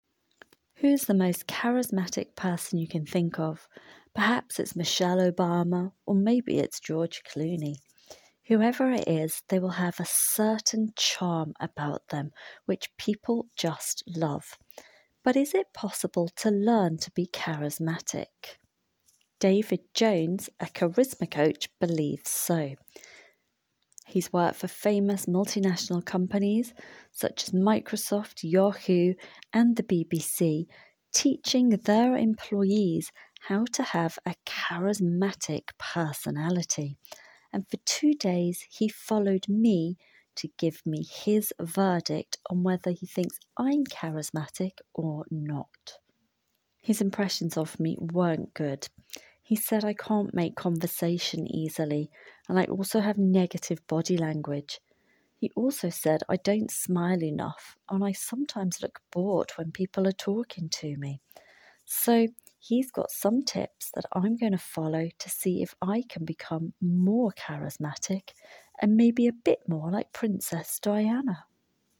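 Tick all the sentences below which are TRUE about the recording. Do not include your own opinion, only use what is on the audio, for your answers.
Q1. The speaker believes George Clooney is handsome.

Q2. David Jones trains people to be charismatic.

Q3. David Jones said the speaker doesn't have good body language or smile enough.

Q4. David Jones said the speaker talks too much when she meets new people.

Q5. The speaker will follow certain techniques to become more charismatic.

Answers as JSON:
{"1": "False", "2": "True", "3": "True", "4": "False", "5": "True"}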